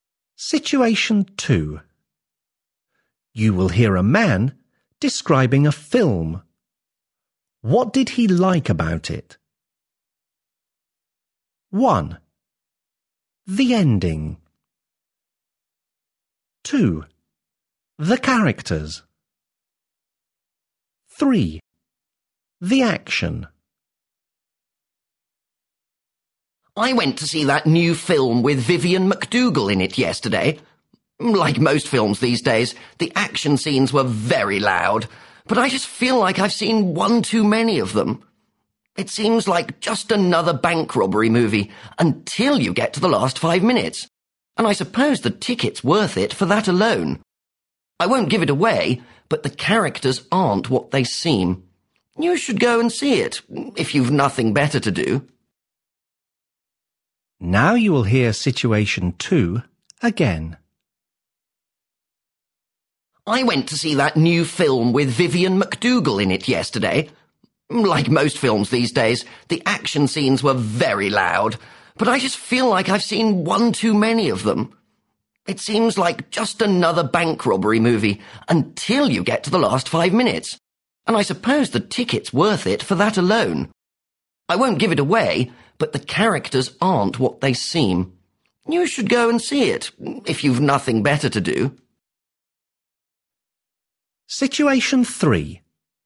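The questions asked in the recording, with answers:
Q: What did he like about it?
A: 1: The ending.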